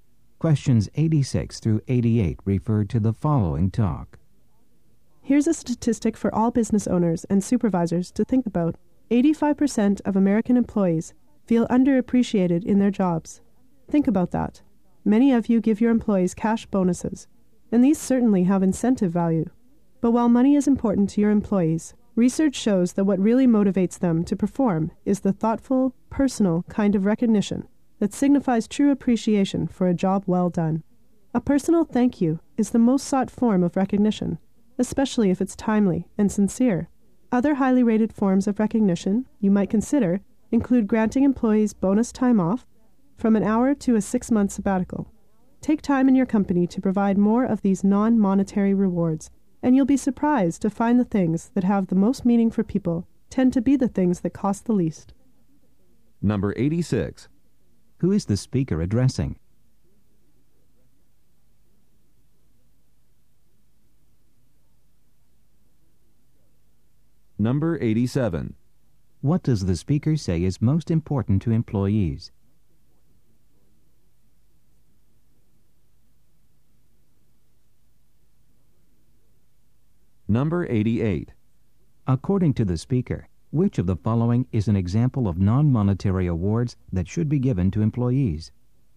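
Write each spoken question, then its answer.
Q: Who is the speaker addressing?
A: Business owners and supervisors

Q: What does the speaker say is most important to employees?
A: Personal recognition, such as a personal thank you

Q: According to the speaker, which of the following is an example of non-monetary awards that should be given to employees?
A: Bonus time off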